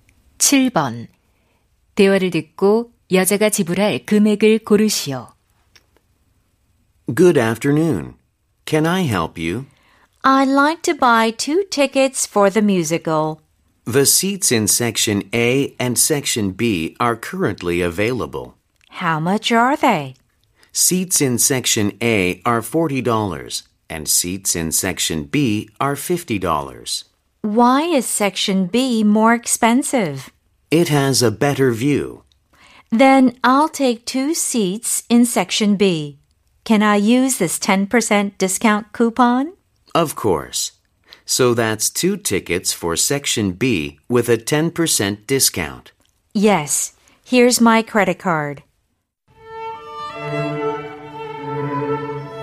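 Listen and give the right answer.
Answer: 90달러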